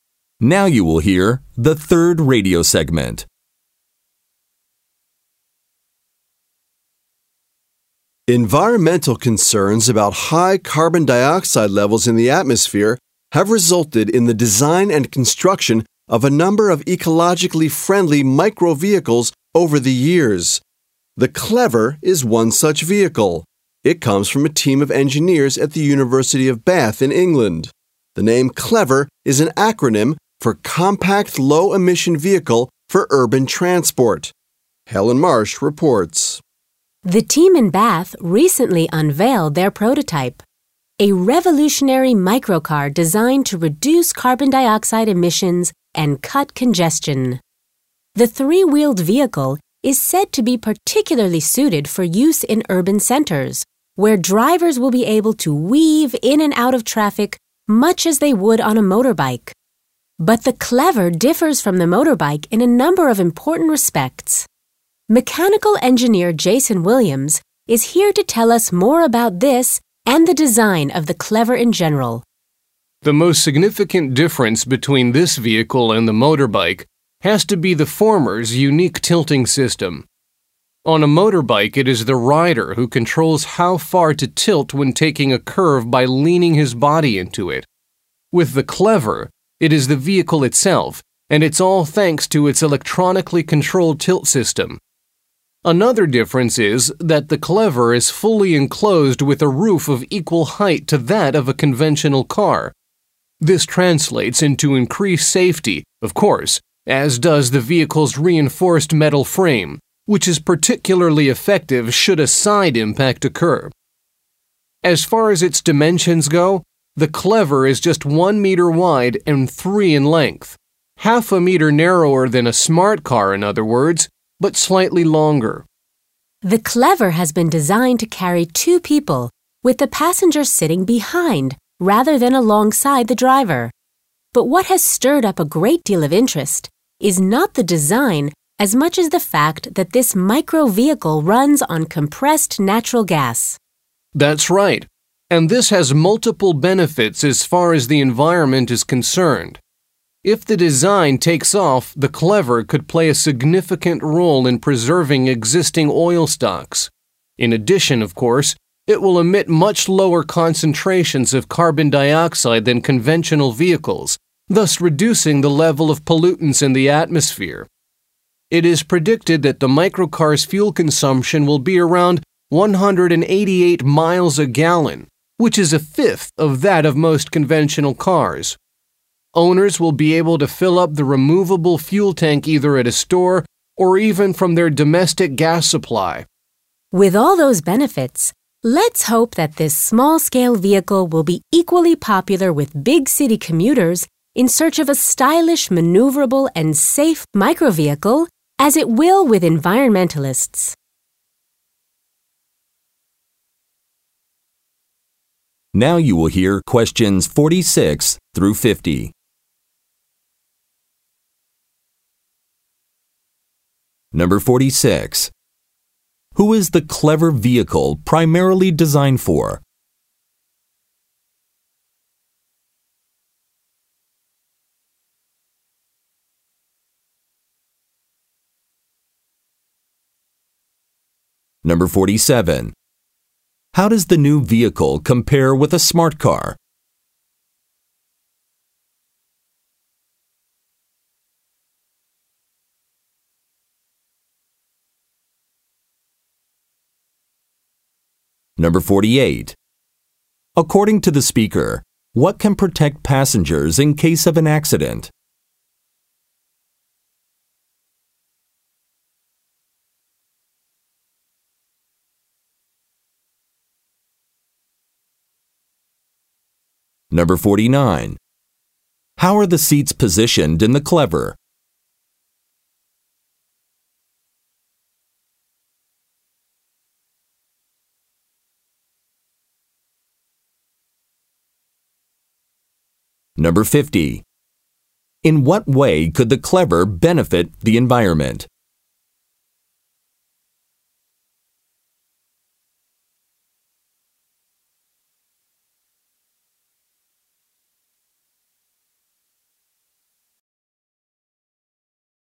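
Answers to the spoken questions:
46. Commuters in big cities
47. It is half a meter narrower but slightly longer
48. Its reinforced metal frame
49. The passenger sits behind the driver
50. It gives off much less carbon dioxide and helps save oil supplies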